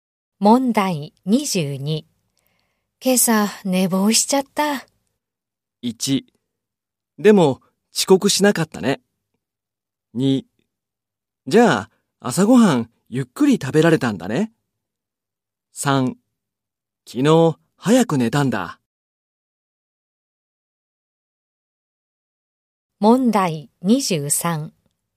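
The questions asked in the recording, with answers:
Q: 今朝、寝坊しちゃった。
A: 1: でも、遅刻しなかったね。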